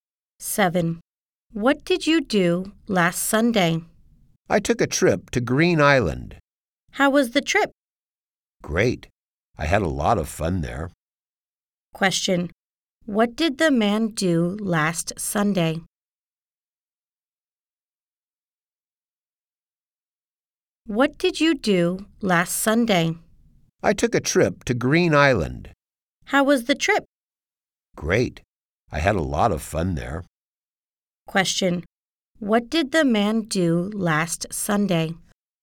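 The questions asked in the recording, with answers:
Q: What did the man do last Sunday?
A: He took a trip to Green Island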